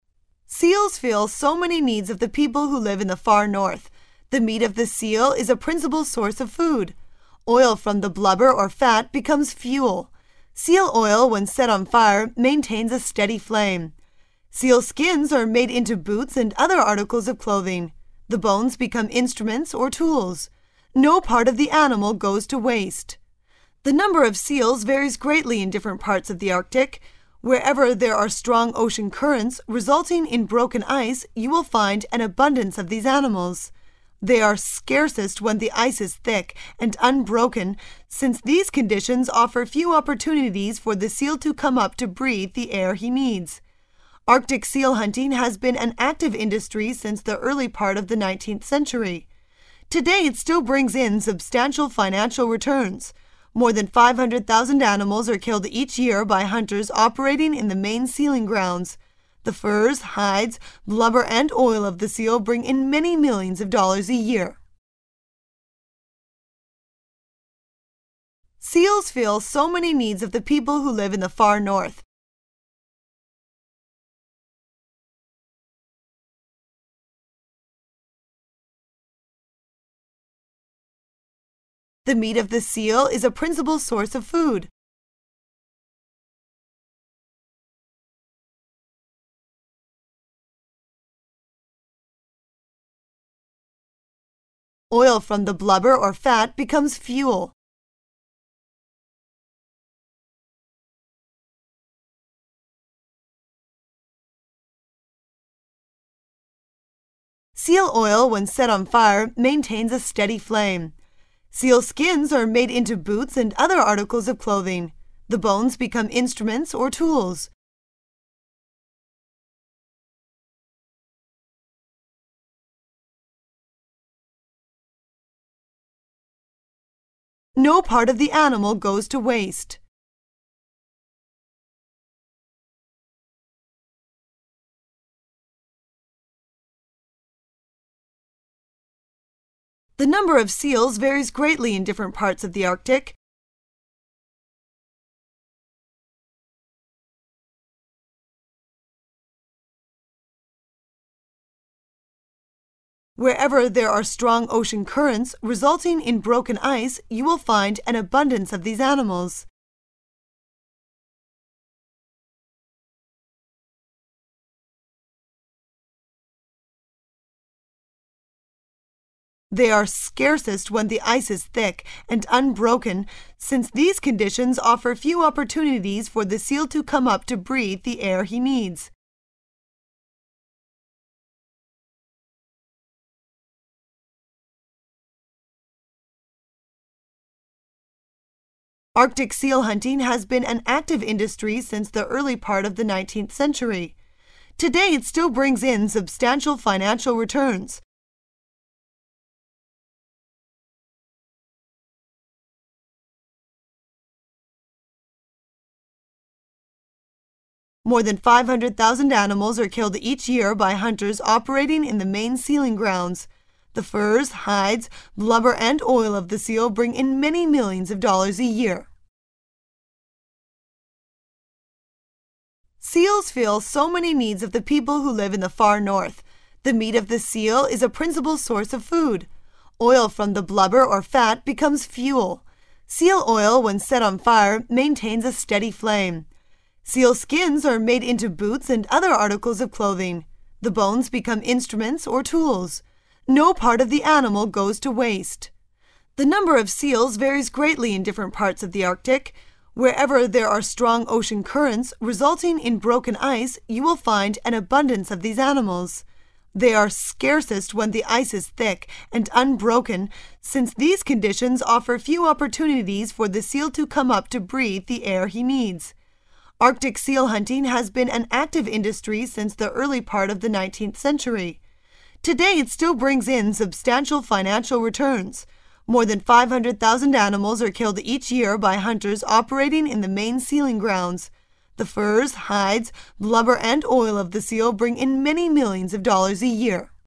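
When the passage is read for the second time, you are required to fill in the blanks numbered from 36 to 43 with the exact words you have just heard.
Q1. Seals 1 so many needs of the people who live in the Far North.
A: fill

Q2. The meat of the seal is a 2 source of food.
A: principal

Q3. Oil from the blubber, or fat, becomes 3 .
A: fuel

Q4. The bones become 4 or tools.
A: instruments

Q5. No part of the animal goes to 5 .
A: waste

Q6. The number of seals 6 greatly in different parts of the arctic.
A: varies

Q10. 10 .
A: Today it still brings in substantial financial returns

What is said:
[解析] 36-46 Seals(36) fill so many needs of the people who live in the Far North. The meat of the seal is a(37)principal source of food. Oil from the blubber, or fat, becomes(38) fuel. Seal oil, when set on a fire, maintains a steady flame. Sealskins are made into boots and other articles of clothing. 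The bones become(39) instruments or tools. No part of the animal goes to (40) waste. The number of seals(41) varies greatly in different parts of the arctic. Wherever there are strong ocean currents, resulting in broken (42) ice, you will find an(43) abundance of these animals.(44) They are scarcest where the ice is thick and unbroken, since these conditions offer few opportunities for the seal to come up to breathe the air he needs. Arctic seal hunting has been an active industry since the early part of the nineteenth century.(45) Today it still brings in substantial financial returns. More than 500,000 animals are killed each year by hunters operating in the main sealing grounds.(46) The furs, hides, blubber and oil of the seal bring in many millions of dollars a year.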